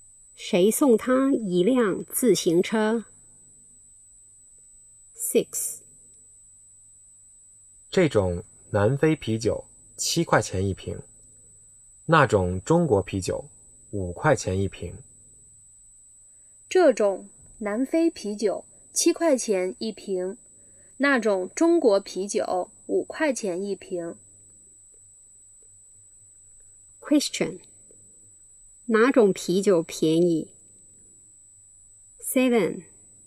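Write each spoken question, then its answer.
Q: 哪种啤酒便宜?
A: 中国啤酒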